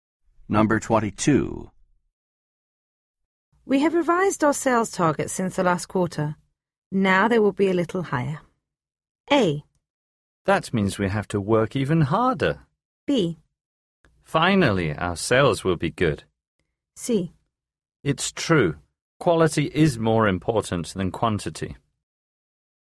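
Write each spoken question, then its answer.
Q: We have revised our sales targets since the last quarter.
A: A: That means we have to work even harder.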